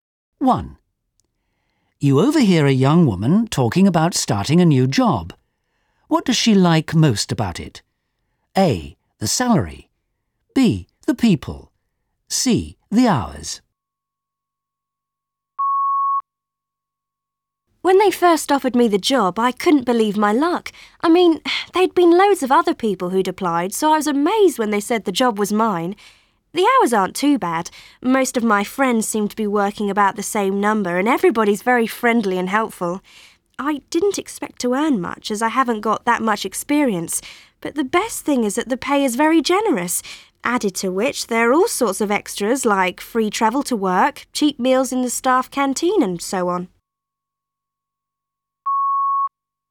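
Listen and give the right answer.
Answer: A: The salary.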